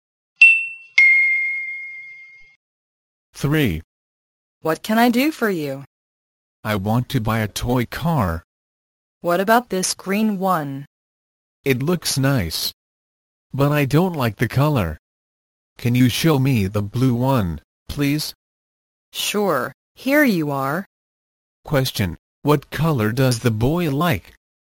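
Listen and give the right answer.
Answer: Blue.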